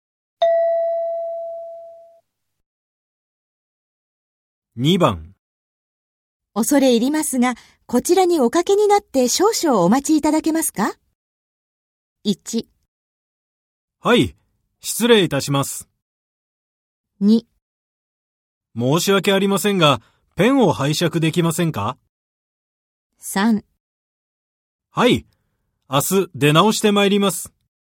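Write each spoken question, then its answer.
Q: 恐れ入りますが、こちらにおかけになって少々お待ちいただけますか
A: 1: はい、失礼いたします。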